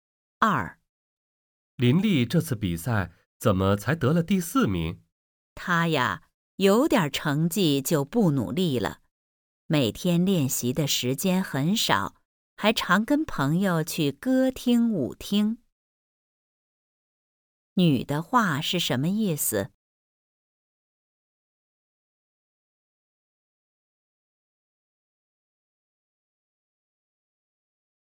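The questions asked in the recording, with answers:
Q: 女的话是什么意思?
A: 林丽有点成绩就不努力了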